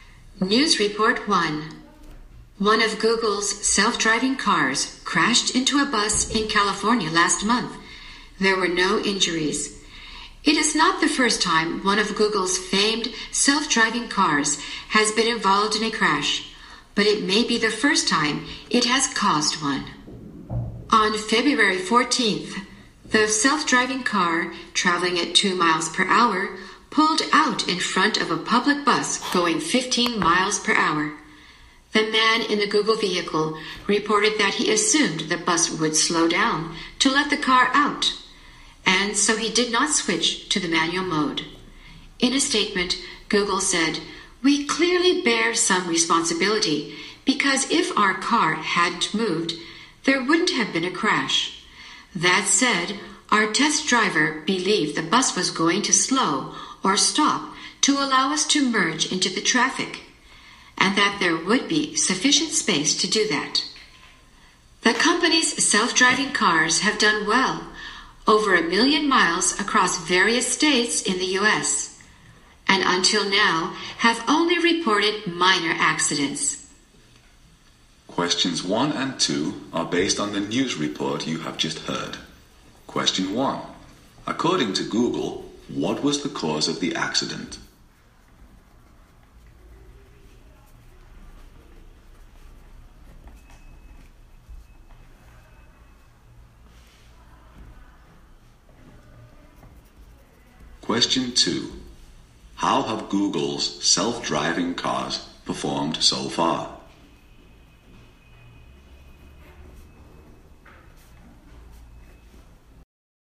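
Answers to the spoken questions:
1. The test driver assumed the bus would slow down or stop to let the car merge, so he did not switch to manual mode.
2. Well; over 1 million miles with only minor accidents reported until now.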